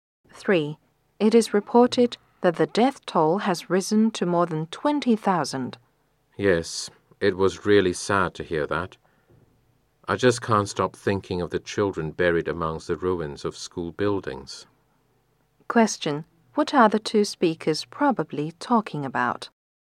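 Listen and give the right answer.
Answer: An earthquake disaster and its victims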